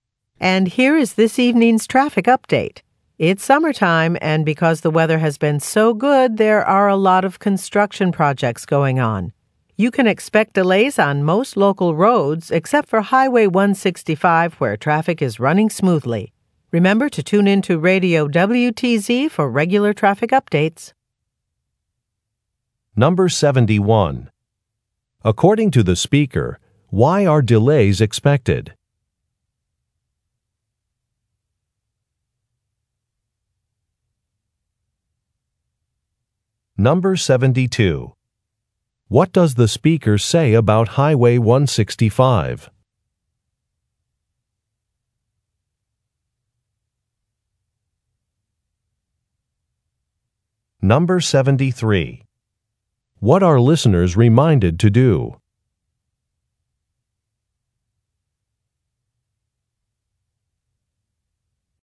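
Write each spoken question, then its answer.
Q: According to the speaker, why are delays expected?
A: Because of construction projects

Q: What does the speaker say about Highway 165?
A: Traffic is running smoothly

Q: What are listeners reminded to do?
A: Tune in to Radio WTZ for regular traffic updates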